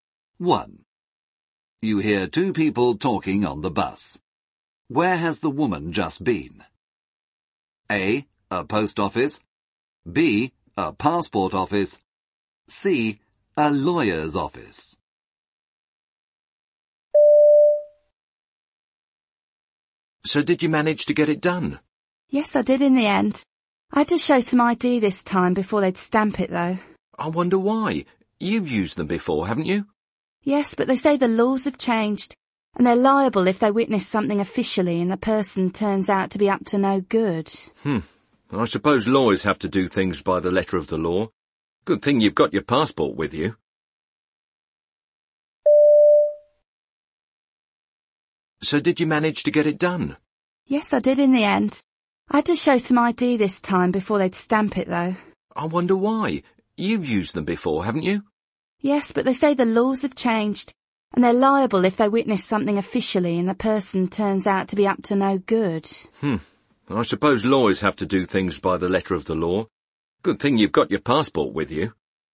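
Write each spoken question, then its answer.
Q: Where has the woman just been?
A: C: a lawyer's office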